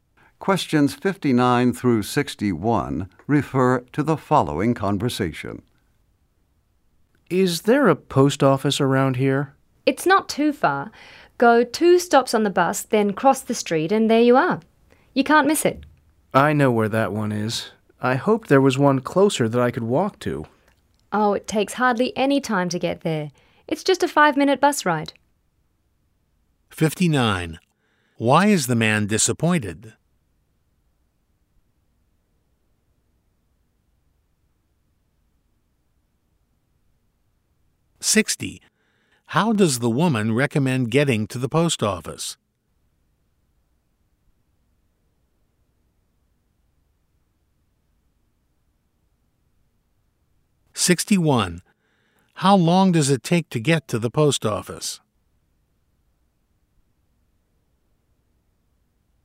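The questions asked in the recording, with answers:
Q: Why is the man disappointed?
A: There is no post office close enough to walk to

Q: How does the woman recommend getting to the post office?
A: By bus

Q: How long does it take to get to the post office?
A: Five minutes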